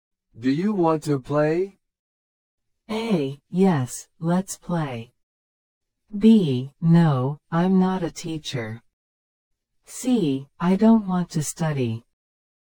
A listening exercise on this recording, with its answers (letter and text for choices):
Select the best response to the question or statement and mark the letter (A), (B), or (C) on your answer sheet.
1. Do you want to play?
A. Yes, let's play!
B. No, I'm not a teacher.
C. I don't want to study.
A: A. Yes, let's play!

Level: 初級者用